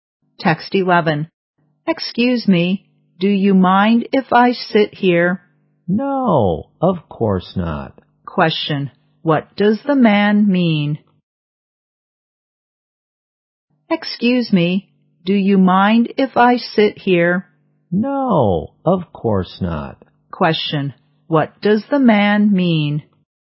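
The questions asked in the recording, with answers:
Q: Question, what does the man mean?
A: He doesn't mind; the woman can sit there.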